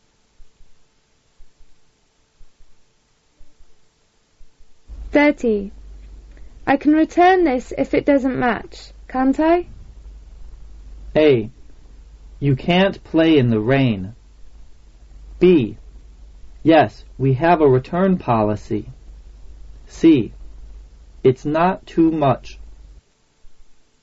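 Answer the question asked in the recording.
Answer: B: Yes, we have a return policy.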